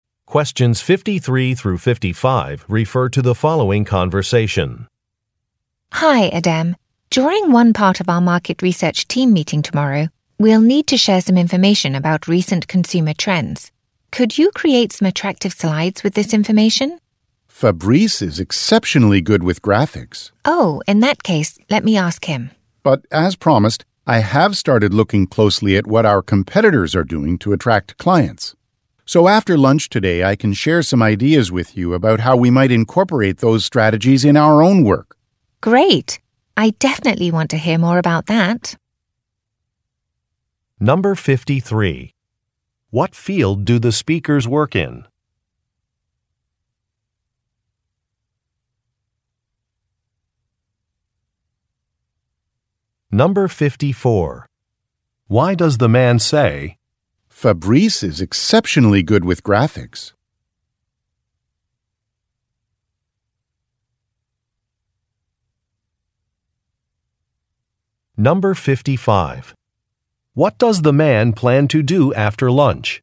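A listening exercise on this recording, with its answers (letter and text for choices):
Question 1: What field do the speakers work in?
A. Market research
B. Art restoration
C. Entertainment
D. Publishing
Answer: A. Market research

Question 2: Why does the man say, "Fabrice is exceptionally good with graphics"?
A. To express surprise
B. To recommend a promotion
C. To confirm that training is unnecessary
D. To decline a request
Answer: D. To decline a request

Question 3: What does the man plan to do after lunch?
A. Submit a report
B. Pack for a trip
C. Share some ideas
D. Read through an agenda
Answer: C. Share some ideas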